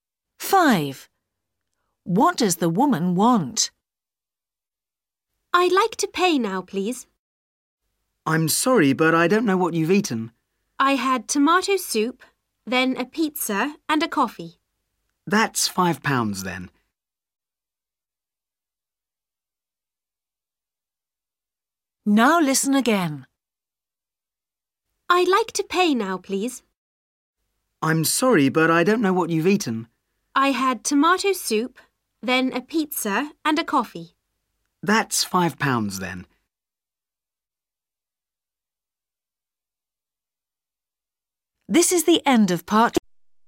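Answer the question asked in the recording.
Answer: To pay her bill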